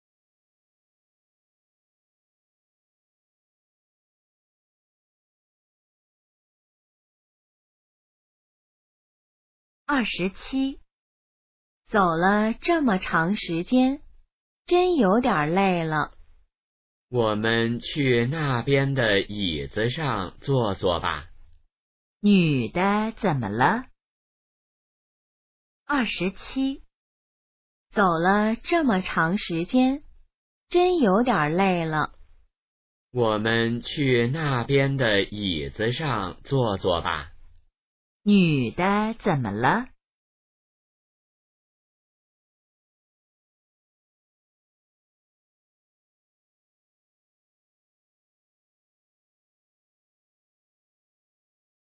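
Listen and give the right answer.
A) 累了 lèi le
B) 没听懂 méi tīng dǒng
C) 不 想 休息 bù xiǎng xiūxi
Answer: A) 累了 lèi le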